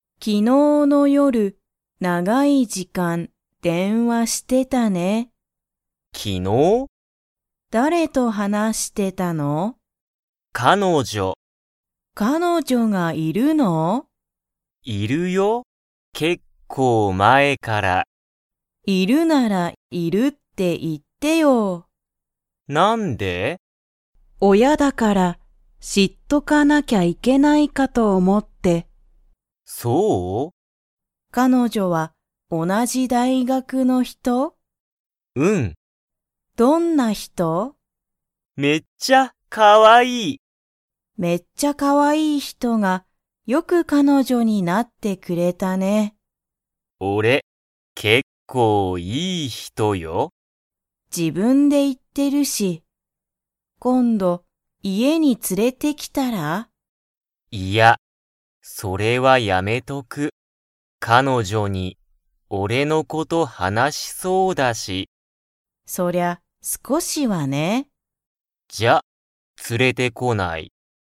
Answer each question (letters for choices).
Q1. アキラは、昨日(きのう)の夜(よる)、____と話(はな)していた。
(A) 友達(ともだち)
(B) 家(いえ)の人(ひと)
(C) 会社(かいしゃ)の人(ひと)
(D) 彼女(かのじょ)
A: D

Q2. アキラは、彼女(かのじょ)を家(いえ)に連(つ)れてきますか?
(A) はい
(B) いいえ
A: B

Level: Level 2